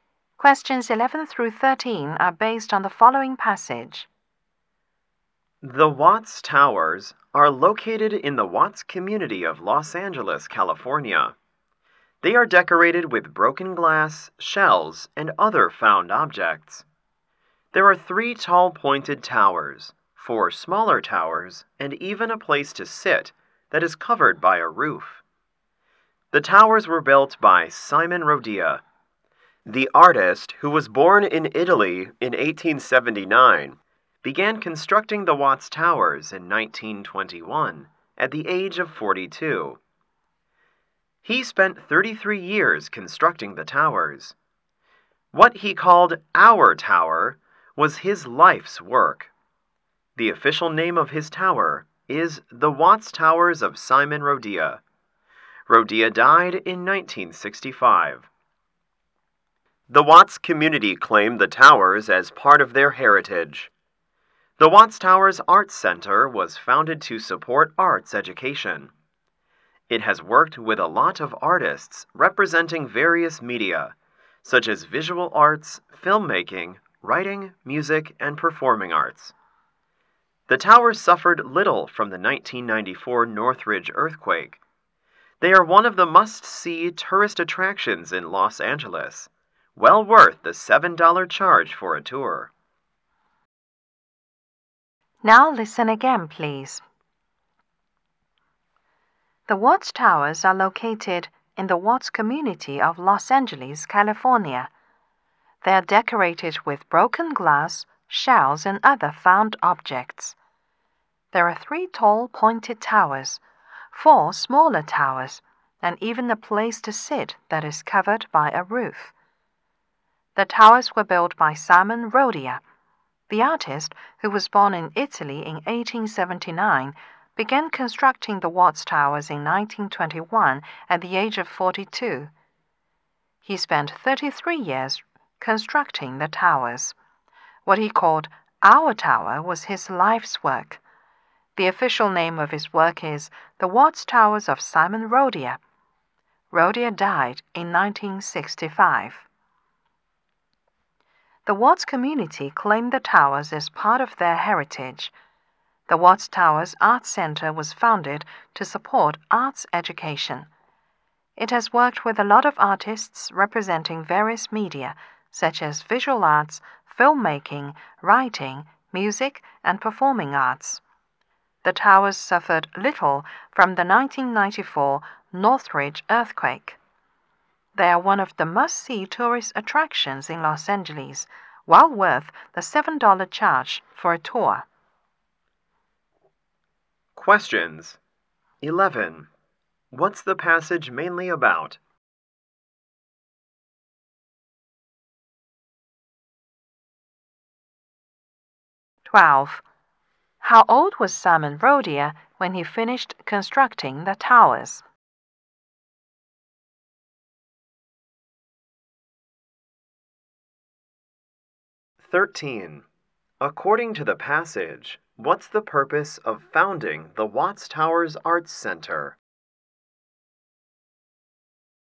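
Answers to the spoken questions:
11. The Watts Towers
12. 75
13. To support arts education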